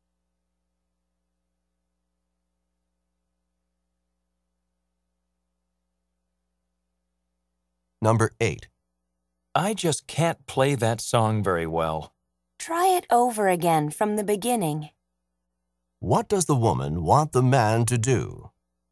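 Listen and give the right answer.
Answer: Play the song again from the beginning.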